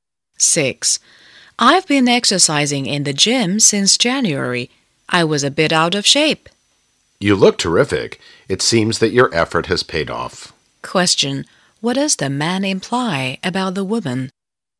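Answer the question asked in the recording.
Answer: She looks fit because her exercise has paid off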